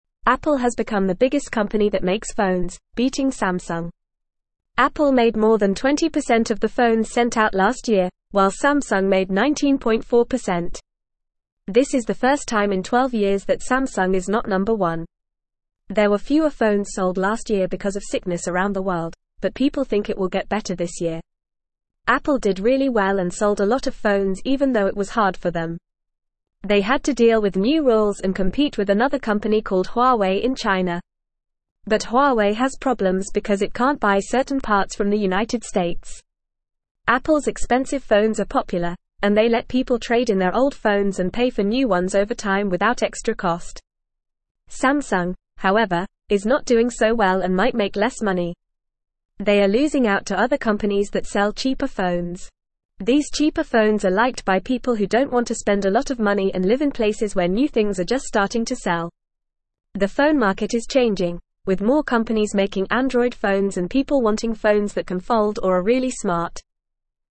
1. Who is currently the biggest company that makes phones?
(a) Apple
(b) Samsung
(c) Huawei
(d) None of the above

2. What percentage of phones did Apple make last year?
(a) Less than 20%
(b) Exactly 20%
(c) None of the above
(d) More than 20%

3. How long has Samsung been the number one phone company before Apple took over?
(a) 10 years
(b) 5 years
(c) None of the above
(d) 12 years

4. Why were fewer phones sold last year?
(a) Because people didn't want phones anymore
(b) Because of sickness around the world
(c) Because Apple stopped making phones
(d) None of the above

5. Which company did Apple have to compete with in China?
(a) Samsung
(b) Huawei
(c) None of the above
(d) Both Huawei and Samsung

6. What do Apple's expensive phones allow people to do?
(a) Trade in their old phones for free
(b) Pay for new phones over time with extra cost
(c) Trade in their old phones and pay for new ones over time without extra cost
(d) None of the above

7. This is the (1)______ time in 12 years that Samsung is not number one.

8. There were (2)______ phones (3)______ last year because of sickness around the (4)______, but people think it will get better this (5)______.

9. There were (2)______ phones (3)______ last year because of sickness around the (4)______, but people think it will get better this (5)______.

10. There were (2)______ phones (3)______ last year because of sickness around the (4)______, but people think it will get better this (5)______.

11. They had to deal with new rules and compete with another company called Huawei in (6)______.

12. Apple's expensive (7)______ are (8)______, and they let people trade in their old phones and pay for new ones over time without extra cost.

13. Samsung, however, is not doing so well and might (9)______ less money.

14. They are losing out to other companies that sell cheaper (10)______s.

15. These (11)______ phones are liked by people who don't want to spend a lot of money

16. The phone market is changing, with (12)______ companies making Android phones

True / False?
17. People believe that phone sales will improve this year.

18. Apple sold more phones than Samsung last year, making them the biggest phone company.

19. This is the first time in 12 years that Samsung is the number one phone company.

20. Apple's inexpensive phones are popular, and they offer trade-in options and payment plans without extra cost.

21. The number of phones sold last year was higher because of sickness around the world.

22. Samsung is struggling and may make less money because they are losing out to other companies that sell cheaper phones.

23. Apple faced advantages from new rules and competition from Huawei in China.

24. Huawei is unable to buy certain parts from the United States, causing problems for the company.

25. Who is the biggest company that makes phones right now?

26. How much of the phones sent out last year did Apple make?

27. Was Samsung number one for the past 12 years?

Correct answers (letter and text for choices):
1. (a) Apple
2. (d) More than 20%
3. (d) 12 years
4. (b) Because of sickness around the world
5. (b) Huawei
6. (c) Trade in their old phones and pay for new ones over time without extra cost
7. first
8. fewer
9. sold
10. world
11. China
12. popular
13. make
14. phone
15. cheaper
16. more
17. True
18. True
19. False
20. False
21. False
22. True
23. False
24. True
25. Apple is the biggest company that makes phones right now.
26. Apple made more than 20% of the phones sent out last year.
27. Yes, Samsung was number one for the past 12 years.

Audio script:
Apple has become the biggest company that makes phones, beating Samsung. Apple made more than 20% of the phones sent out last year, while Samsung made 19.4%. This is the first time in 12 years that Samsung is not number one. There were fewer phones sold last year because of sickness around the world, but people think it will get better this year.
Apple did really well and sold a lot of phones even though it was hard for them. They had to deal with new rules and compete with another company called Huawei in China. But Huawei has problems because it can't buy certain parts from the United States. Apple's expensive phones are popular, and they let people trade in their old phones and pay for new ones over time without extra cost.
Samsung, however, is not doing so well and might make less money. They are losing out to other companies that sell cheaper phones. These cheaper phones are liked by people who don't want to spend a lot of money and live in places where new things are just starting to sell. The phone market is changing, with more companies making Android phones and people wanting phones that can fold or are really smart.

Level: Level 2